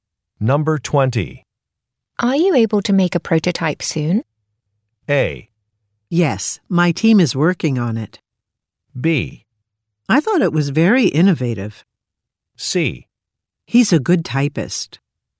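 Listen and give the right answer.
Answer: A: Yes, my team is working on it.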